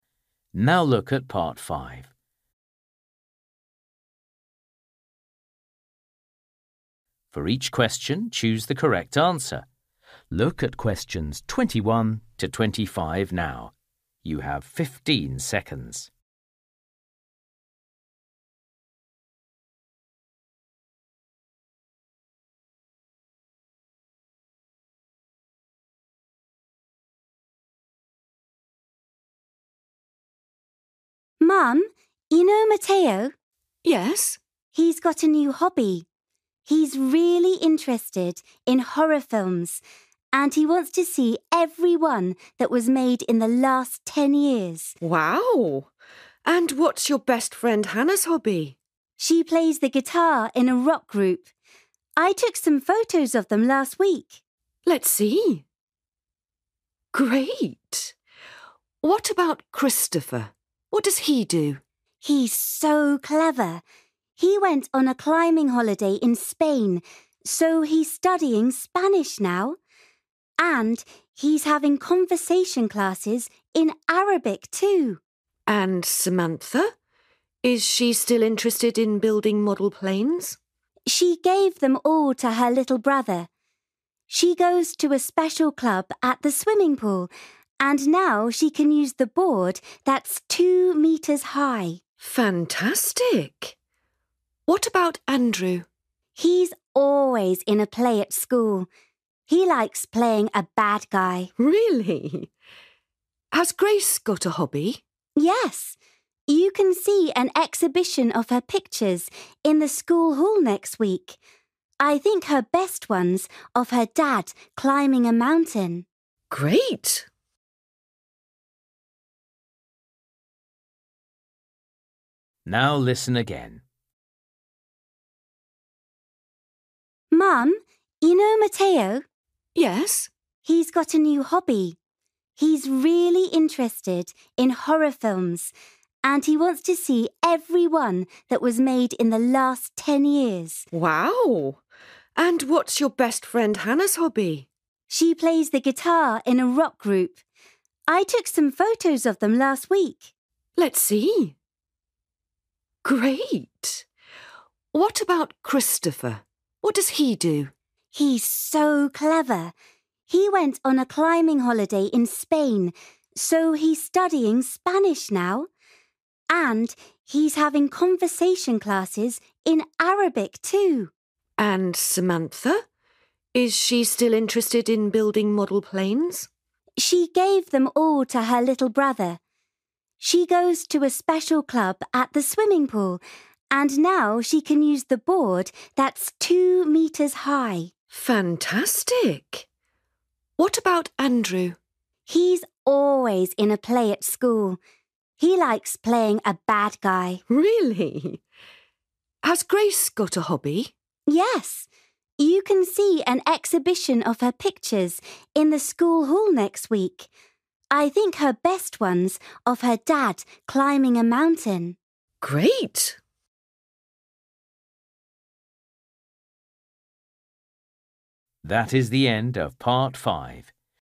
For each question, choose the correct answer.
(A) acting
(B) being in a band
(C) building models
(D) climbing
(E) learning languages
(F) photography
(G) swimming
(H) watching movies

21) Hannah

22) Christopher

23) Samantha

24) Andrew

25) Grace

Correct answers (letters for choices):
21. B
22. E
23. G
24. A
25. F

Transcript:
Girl: Mum, you know Mateo?
Woman: Yes.
Girl: He's got a new hobby. He's really interested in horror films and he wants to see every one that was made in the last ten years!
Woman: Wow! And what's your best friend Hannah's hobby?
Girl: She plays the guitar in a rock group. I took some photos of them last week.
Woman: Let's see ... Great! What about Christopher, what does he do?
Girl: He's so clever. He went on a climbing holiday in Spain, so he's studying Spanish now. And he's having conversation classes in Arabic, too!
Woman: And Samantha? Is she still interested in building model planes?
Girl: She gave them all to her little brother. She goes to a special club at the swimming pool and now she can use the board that's two metres high!
Woman: Fantastic! What about Andrew?
Girl: He's always in a play at school. He likes playing a bad guy.
Woman: Really? Has Grace got a hobby?
Girl: Yes, you can see an exhibition of her pictures in the school hall next week. I think her best one's of her dad climbing a mountain.
Woman: Great!

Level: A2